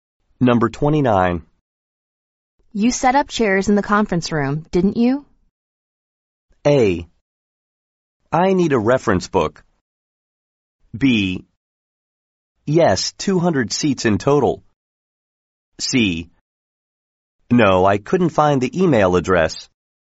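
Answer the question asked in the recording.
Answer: B: Yes, 200 seats in total.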